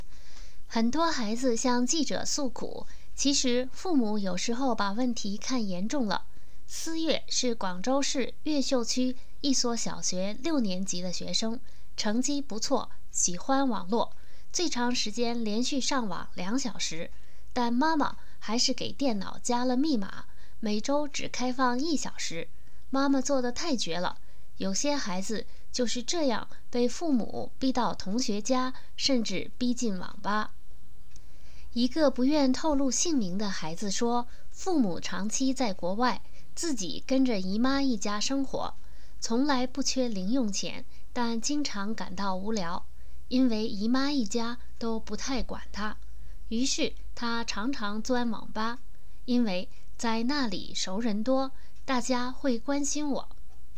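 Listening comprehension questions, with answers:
Please answer the following questions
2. 思越的妈妈每星期让思越上网多长时间?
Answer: 每周只开放一小时

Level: 3rd Year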